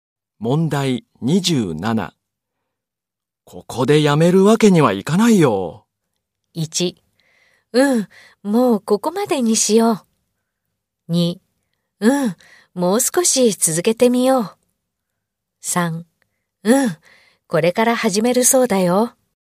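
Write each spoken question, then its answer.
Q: ここでやめるわけにはいかないよ。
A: 2: うん、もう少し続けてみよう。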